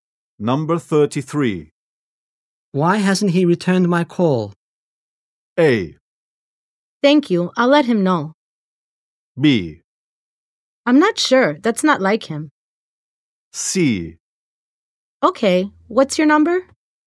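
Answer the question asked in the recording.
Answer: B: I'm not sure, that's not like him.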